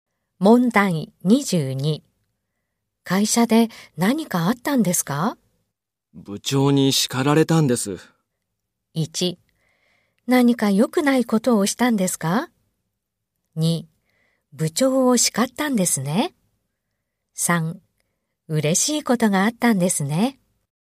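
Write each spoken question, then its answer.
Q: 会社で何かあったんですか?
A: 1: 何か良くないことをしたんですか?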